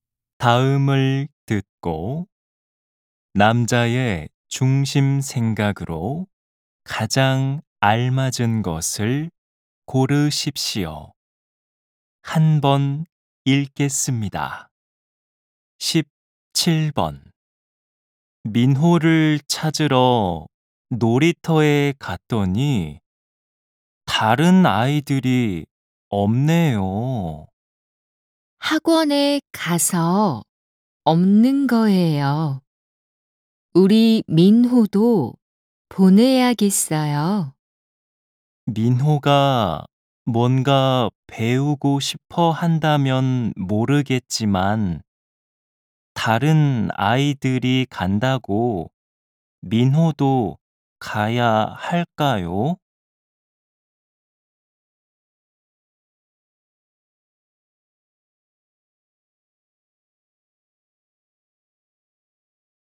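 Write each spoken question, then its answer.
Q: 다음을 듣고 남자의 중심 생각으로 가장 알맞은 것을 고르십시오.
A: 다른 아이들이 간다고 해서 아이를 학원에 보낼 필요는 없다 (아이가 배우고 싶어 할 때 보내야 한다).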